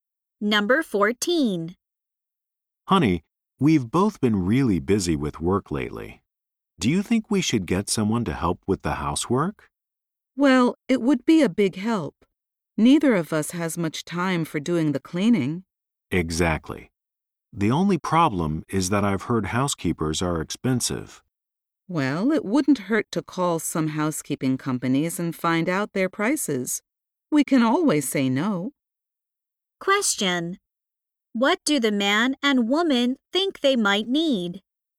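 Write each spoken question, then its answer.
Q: What do the man and woman think they might need?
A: A housekeeper to help with the housework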